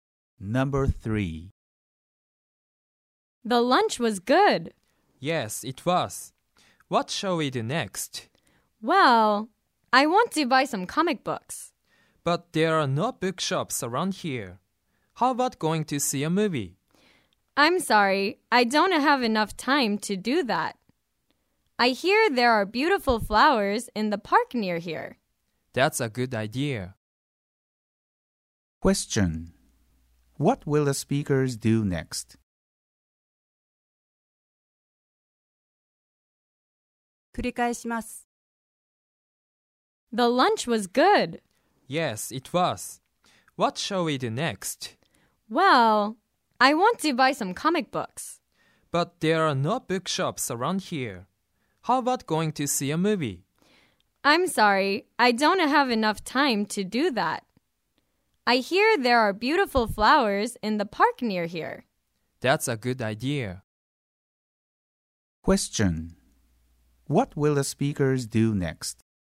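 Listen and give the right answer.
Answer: They will go to the park to see the flowers.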